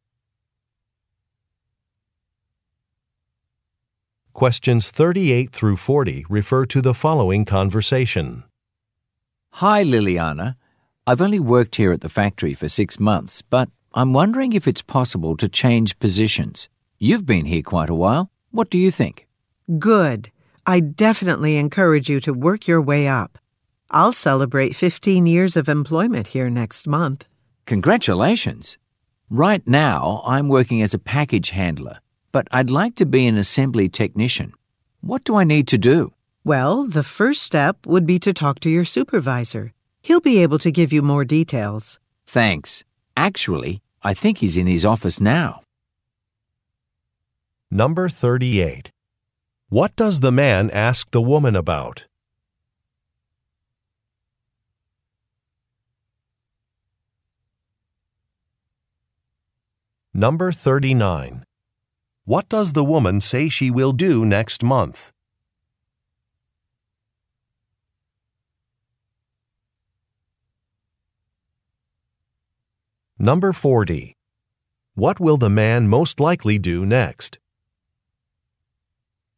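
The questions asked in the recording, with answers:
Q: What does the man ask the woman about?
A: Changing positions

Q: What does the woman say she will do next month?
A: Celebrate 15 years of employment

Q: What will the man most likely do next?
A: Talk to his supervisor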